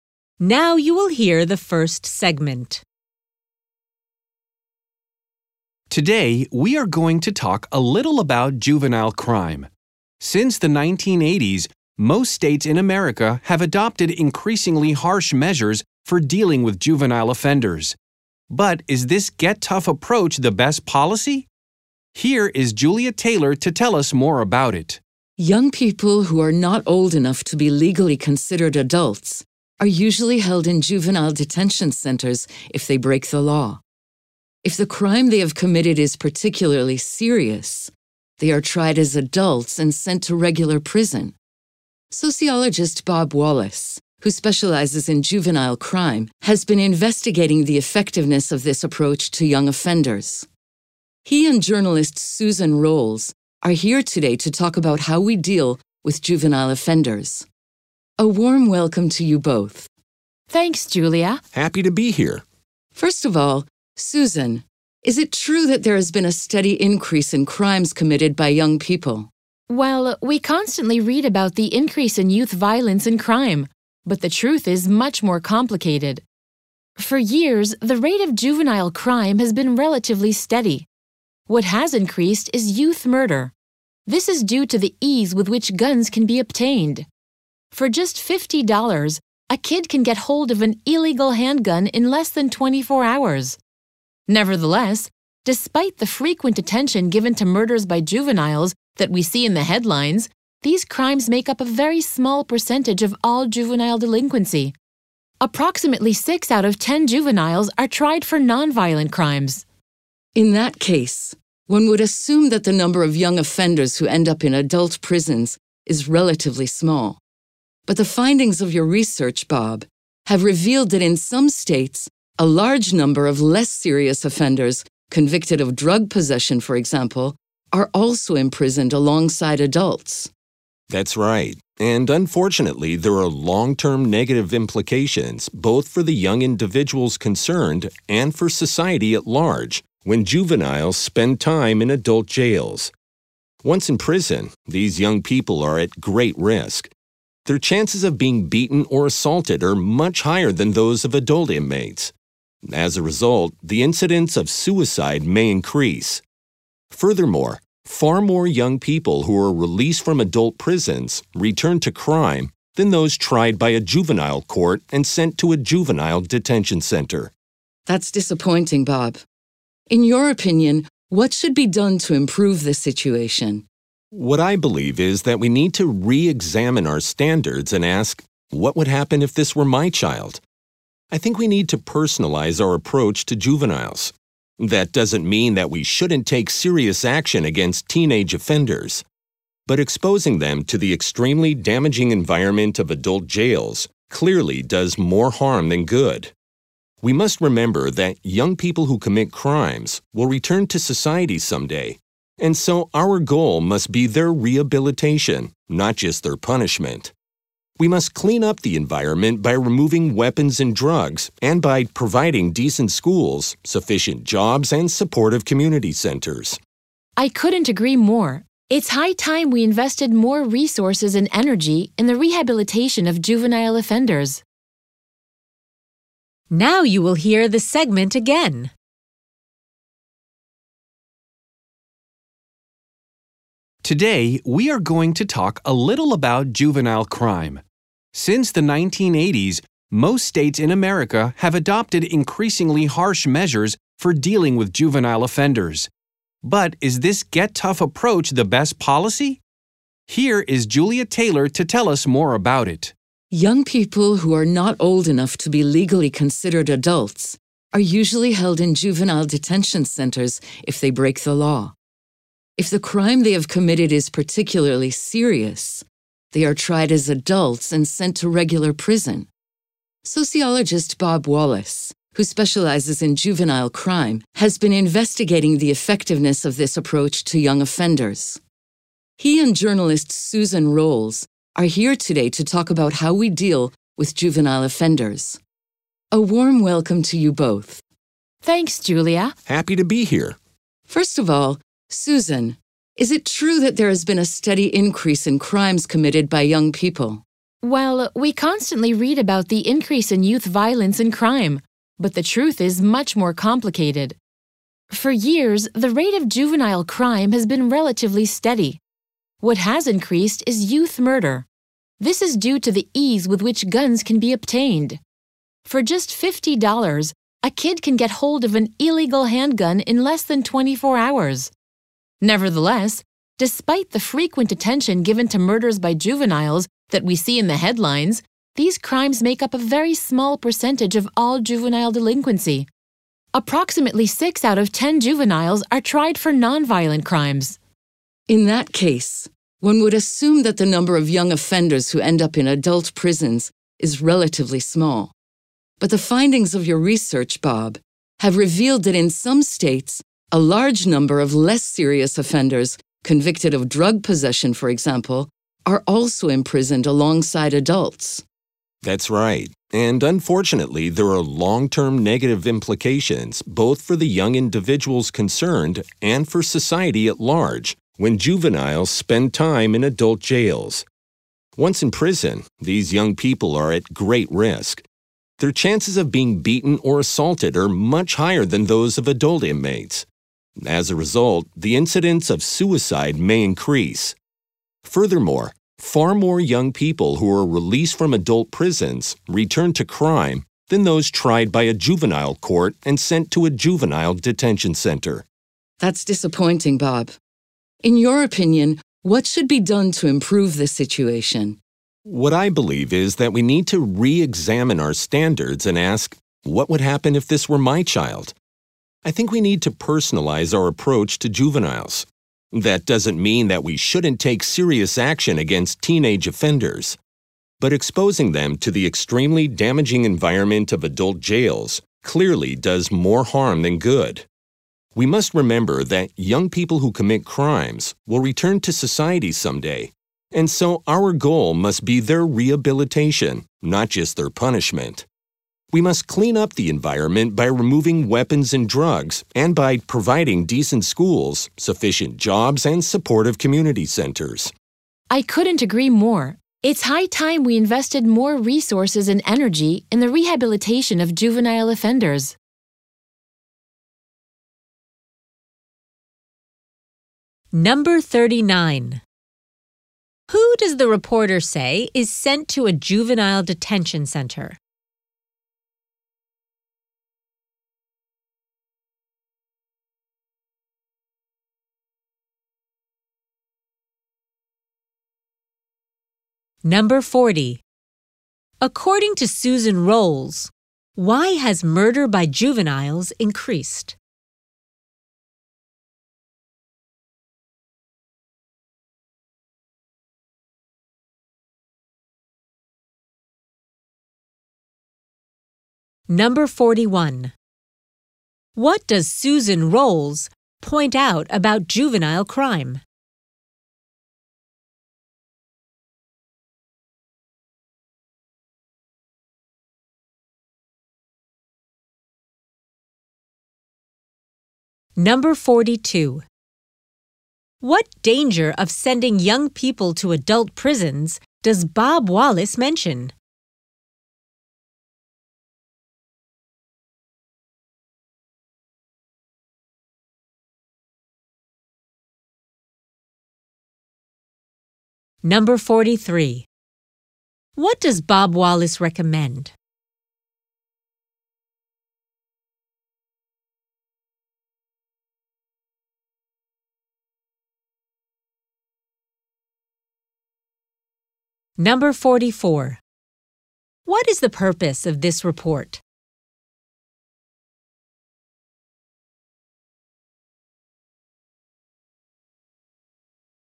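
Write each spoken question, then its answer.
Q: Who does the reporter say is sent to a juvenile detention center?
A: Young people not legally old enough to be adults who break the law (unless the crime is particularly serious)

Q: According to Susan Rolls, why has murder by juveniles increased?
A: Because guns are easy to obtain

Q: What does Bob Wallace recommend?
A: Focusing on rehabilitation rather than just punishment, and not putting juveniles in adult jails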